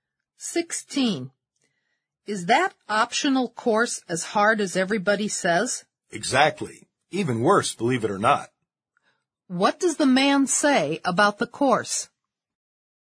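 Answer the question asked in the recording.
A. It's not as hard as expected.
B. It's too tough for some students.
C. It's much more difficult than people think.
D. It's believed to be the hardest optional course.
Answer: C. It's much more difficult than people think.

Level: 四级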